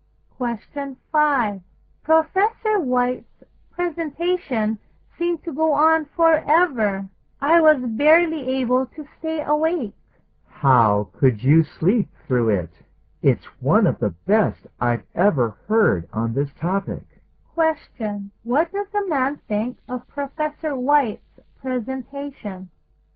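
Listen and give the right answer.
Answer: It was excellent, one of the best on the topic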